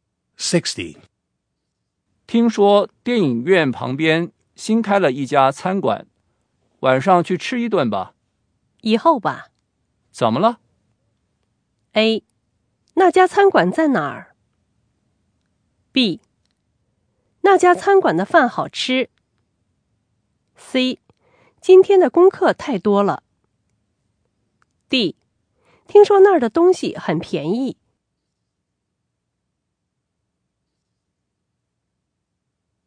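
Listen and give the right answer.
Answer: C: 今天的功课太多了。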